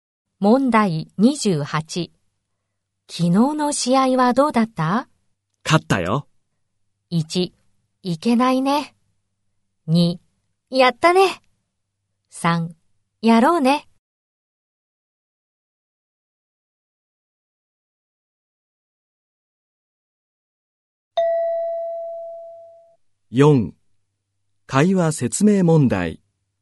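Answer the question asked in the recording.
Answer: 2: やったね。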